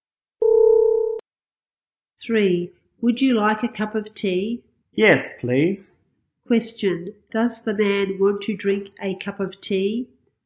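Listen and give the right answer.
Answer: Yes, he does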